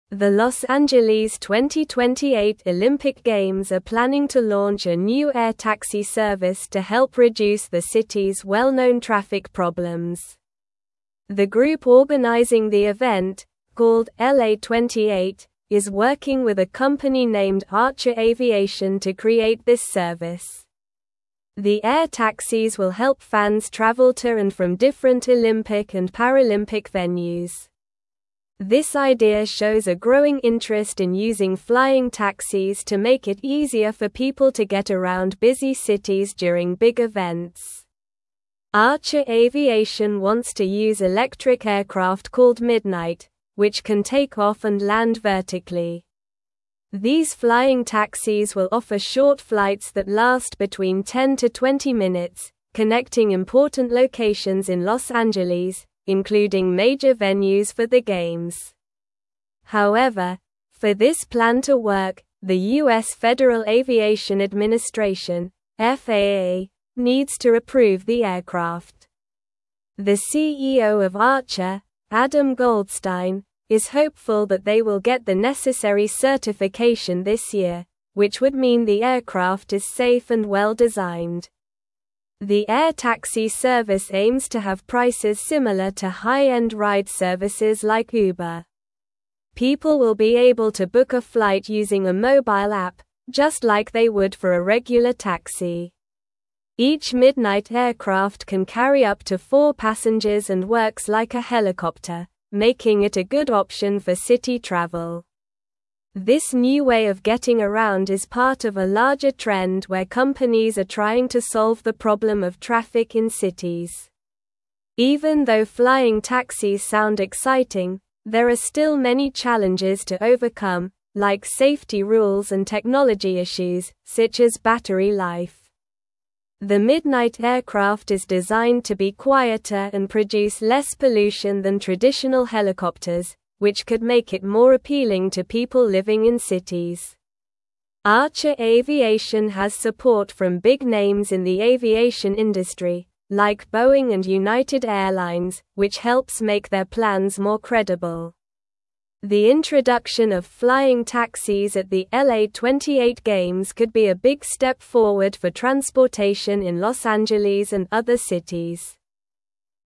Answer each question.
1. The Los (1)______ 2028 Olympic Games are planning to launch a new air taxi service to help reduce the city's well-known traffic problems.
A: Angeles

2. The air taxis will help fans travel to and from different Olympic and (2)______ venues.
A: Paralympic

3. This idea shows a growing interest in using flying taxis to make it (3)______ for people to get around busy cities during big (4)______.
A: easier

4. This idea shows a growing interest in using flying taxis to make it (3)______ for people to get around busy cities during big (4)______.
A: events

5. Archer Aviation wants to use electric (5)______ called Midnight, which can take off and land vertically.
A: aircraft

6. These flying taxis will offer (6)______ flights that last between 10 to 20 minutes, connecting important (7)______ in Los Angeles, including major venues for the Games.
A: short

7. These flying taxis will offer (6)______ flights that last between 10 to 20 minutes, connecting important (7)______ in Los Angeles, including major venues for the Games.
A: locations

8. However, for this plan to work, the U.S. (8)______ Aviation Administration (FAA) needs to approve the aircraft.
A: Federal

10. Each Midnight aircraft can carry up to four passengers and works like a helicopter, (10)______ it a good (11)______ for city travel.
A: making

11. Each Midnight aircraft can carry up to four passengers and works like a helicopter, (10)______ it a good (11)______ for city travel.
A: option

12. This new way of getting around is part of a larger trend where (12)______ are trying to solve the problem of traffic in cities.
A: companies

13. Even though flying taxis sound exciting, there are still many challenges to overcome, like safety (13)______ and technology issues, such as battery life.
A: rules

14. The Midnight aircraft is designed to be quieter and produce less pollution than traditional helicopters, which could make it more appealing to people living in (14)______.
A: cities

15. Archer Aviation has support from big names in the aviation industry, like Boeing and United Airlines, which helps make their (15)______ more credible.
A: plans

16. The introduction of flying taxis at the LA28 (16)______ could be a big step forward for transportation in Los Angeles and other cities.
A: Games

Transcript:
The Los Angeles 2028 Olympic Games are planning to launch a new air taxi service to help reduce the city's well-known traffic problems. The group organizing the event, called LA28, is working with a company named Archer Aviation to create this service. The air taxis will help fans travel to and from different Olympic and Paralympic venues. This idea shows a growing interest in using flying taxis to make it easier for people to get around busy cities during big events.
Archer Aviation wants to use electric aircraft called Midnight, which can take off and land vertically. These flying taxis will offer short flights that last between 10 to 20 minutes, connecting important locations in Los Angeles, including major venues for the Games. However, for this plan to work, the U.S. Federal Aviation Administration (FAA) needs to approve the aircraft. The CEO of Archer, Adam Goldstein, is hopeful that they will get the necessary certification this year, which would mean the aircraft is safe and well-designed.
The air taxi service aims to have prices similar to high-end ride services like Uber. People will be able to book a flight using a mobile app, just like they would for a regular taxi. Each Midnight aircraft can carry up to four passengers and works like a helicopter, making it a good option for city travel. This new way of getting around is part of a larger trend where companies are trying to solve the problem of traffic in cities.
Even though flying taxis sound exciting, there are still many challenges to overcome, like safety rules and technology issues, such as battery life. The Midnight aircraft is designed to be quieter and produce less pollution than traditional helicopters, which could make it more appealing to people living in cities. Archer Aviation has support from big names in the aviation industry, like Boeing and United Airlines, which helps make their plans more credible. The introduction of flying taxis at the LA28 Games could be a big step forward for transportation in Los Angeles and other cities.

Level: Level 3